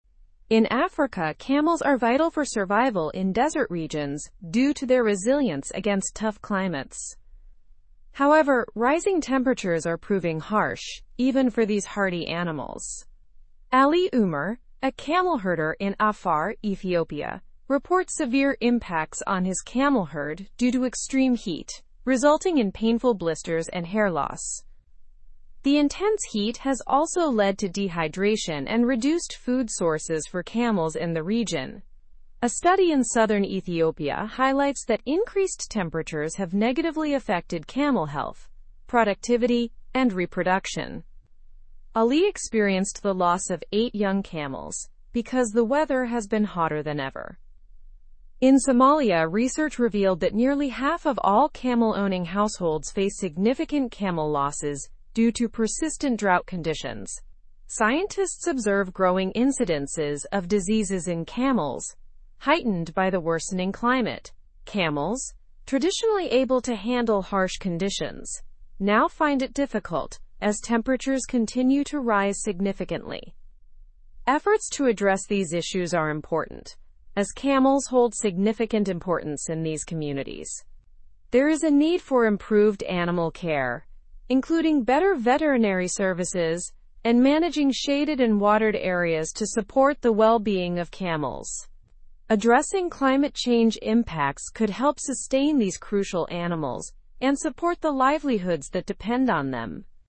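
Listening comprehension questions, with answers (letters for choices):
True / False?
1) Worsening climate conditions have led to more diseases in camels.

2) Many Somali households without camels enjoy profits from rain.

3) Camels in Africa are facing harsh conditions due to rising temperatures.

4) Dehydration and increased food sources are also advantages for camels.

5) Neglected animal care and ignoring climate change can hinder camels.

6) Southern Ethiopia studies show decreased temperatures benefit camels' health.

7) Camels play a vital role in the communities that rely on them.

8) Ali Umer is a camel herder in Afar, Ethiopia, experiencing negative impacts on his camels.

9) What is the primary challenge for camels in Africa?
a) Rising temperatures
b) Availability of camels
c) Excessive rainfall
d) Overpopulation of camels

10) Who reported the severe impacts on camel herds?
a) Ali Umer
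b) John Smith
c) Maria Gonzalez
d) Ahmed Khan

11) What resulted from the extreme heat, according to Ali Umer?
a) Painful blisters on camels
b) Abundant food supply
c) Increased reproduction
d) More camel births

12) What has a study in southern Ethiopia revealed?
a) Increased temperatures affect camel health negatively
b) Climate is getting cooler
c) Camels thrive in heat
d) Less need for camels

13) What problem are Somali camel-owning households facing?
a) Significant camel losses due to drought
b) Surplus food for camels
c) Abundant water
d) No climate effects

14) What have scientists observed due to worsening climate?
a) Growing incidences of diseases in camels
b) Decrease in camel population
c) Increase in camel sales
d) Climate stability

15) Why is it crucial to address issues affecting camels?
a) Camels are significant for communities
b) Camels are less important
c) No effect on livelihoods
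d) Camels are abundant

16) What measure could help sustain camels?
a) Improved veterinary services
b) Ignoring climate change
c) Reducing camel numbers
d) Less water for camels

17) What issue do rising temperatures pose for camels in Africa?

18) Who is Ali Umer, and where is he from?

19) What effect does the extreme heat have on the camels of Ali Umer?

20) What findings does the study in southern Ethiopia reveal?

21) What are Somali camel-owning households experiencing?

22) What has research in Somalia indicated about camels and diseases?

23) What efforts are needed to support camel welfare?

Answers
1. True
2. False
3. True
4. False
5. True
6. False
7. True
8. True
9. a
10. a
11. a
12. a
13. a
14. a
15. a
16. a
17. Severe impacts like blisters, hair loss and dehydration
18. A camel herder from Afar, Ethiopia
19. Painful blisters, hair loss, dehydration and the loss of 8 young camels
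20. Increased temperatures have harmed camel health, productivity and reproduction
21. Significant camel losses due to persistent drought
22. Growing incidences of diseases, heightened by the worsening climate
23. Better veterinary services, shaded and watered areas, and addressing climate change

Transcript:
In Africa, camels are vital for survival in desert regions due to their resilience against tough climates. However, rising temperatures are proving harsh even for these hardy animals. Ali Umer, a camel herder in Afar, Ethiopia, reports severe impacts on his camel herd due to extreme heat, resulting in painful blisters and hair loss.
The intense heat has also led to dehydration and reduced food sources for camels in the region. A study in southern Ethiopia highlights that increased temperatures have negatively affected camel health, productivity, and reproduction. Ali experienced the loss of eight young camels because the weather has been hotter than ever.
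In Somalia, research revealed that nearly half of all camel-owning households face significant camel losses due to persistent drought conditions. Scientists observe growing incidences of diseases in camels, heightened by the worsening climate. Camels, traditionally able to handle harsh conditions, now find it difficult as temperatures continue to rise significantly.
Efforts to address these issues are important, as camels hold significant importance in these communities. There is a need for improved animal care, including better veterinary services and managing shaded and watered areas to support the well-being of camels. Addressing climate change impacts could help sustain these crucial animals and support the livelihoods that depend on them.

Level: Level 3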